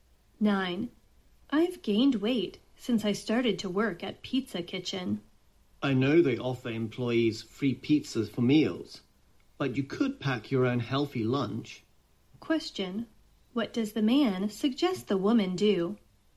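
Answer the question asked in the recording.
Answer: Bring her own healthy lunch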